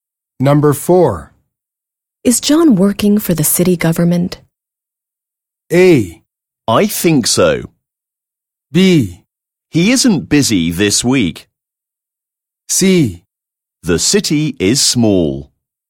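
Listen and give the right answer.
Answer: A: I think so.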